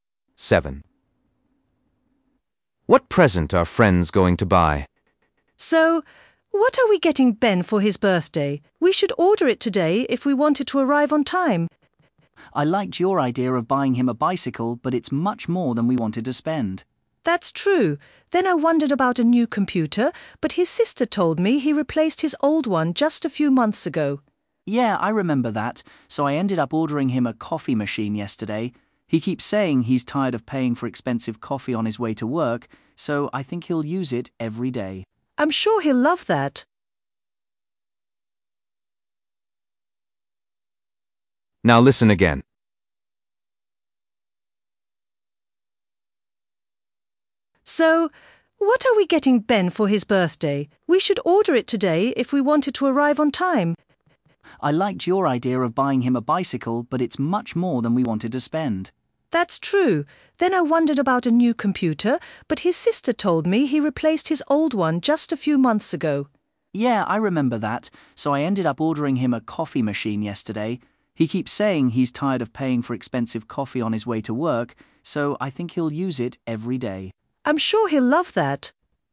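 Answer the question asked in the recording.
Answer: a coffee machine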